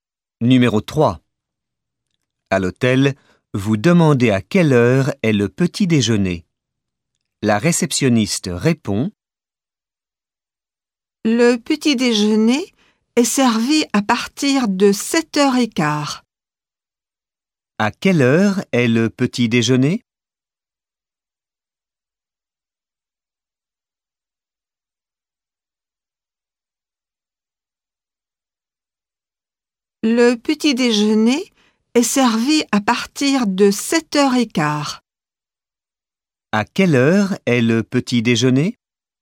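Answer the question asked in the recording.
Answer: À partir de 7h15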